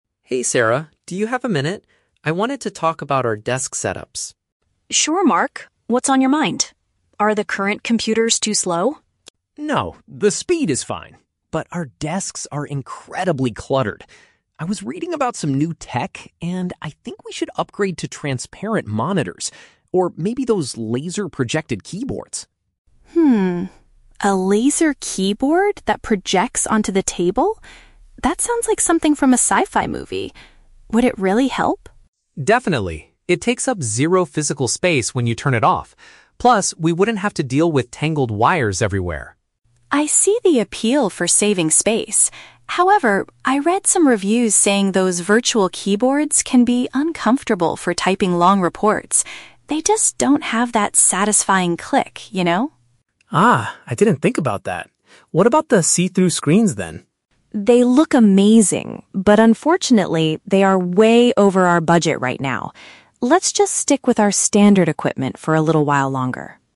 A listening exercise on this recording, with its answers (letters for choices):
Listen to a conversation between an employee and an IT Manager, then choose the correct answer (A, B, or C) for each question.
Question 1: What is the main problem with the current workspace?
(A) The computers operate too slowly.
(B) There is not enough free space on the desks.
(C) The office chairs are very uncomfortable.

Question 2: Why does Sarah hesitate to buy the new typing devices?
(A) They might not be suitable for extensive writing tasks.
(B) They require too many confusing cables to connect.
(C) They are easily damaged by coffee spills.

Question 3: What is the final decision regarding the transparent monitors?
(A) They will replace the standard equipment immediately.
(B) They cost too much money for the company at this time.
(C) They are currently out of stock at the technology store.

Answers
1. B
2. A
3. B

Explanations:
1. Mark mentions that their desks are "incredibly cluttered," which means they are full of things and lack free space. Why the trap is wrong: Option (A) is the trap. Sarah asks if the computers are "too slow," but Mark immediately rejects this by saying, "No, the speed is fine." Option (C) is plausible in an office setting but is never mentioned.
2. Sarah points out that the virtual keyboards can be "uncomfortable for typing long reports," which is a paraphrase of "extensive writing tasks." Why the trap is wrong: Option (B) is the trap. The audio mentions wires, but Mark says the new keyboards mean they wouldn't have to deal with "tangled wires" (cables). Option (C) is a highly plausible real-world issue, but it is not discussed in the conversation.
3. Sarah states that the see-through screens are "way over our budget right now," meaning they are too expensive. Why the trap is wrong: Option (A) is the trap. Sarah explicitly rejects replacing the equipment immediately by saying, "Let's just stick with our standard equipment for a little while longer." Option (C) is plausible but is never mentioned in the audio.

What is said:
Mark: Hey Sarah, do you have a minute? I wanted to talk about our desk setups.
Sarah: Sure, Mark. What's on your mind? Are the current computers too slow?
Mark: No, the speed is fine. But our desks are incredibly cluttered. I was reading about some new tech, and I think we should upgrade to transparent monitors or maybe those laser-projected keyboards.
A laser keyboard that projects onto the table? That sounds like something from a sci-fi movie. Would it really help?
Mark: Definitely! It takes up zero physical space when you turn it off. Plus, we wouldn't have to deal with tangled wires everywhere.
Sarah: I see the appeal for saving space. However, I read some reviews saying those virtual keyboards can be uncomfortable for typing long reports. They just don't have that satisfying click, you know?
Mark: Ah, I didn't think about that. What about the see-through screens, then?
Sarah: They look amazing, but unfortunately, they are way over our budget right now. Let's just stick with our standard equipment for a little while longer.